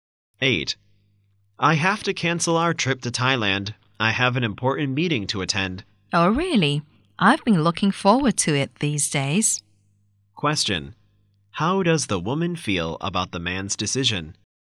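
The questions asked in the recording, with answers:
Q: How does the woman feel about the man's decision?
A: Disappointed.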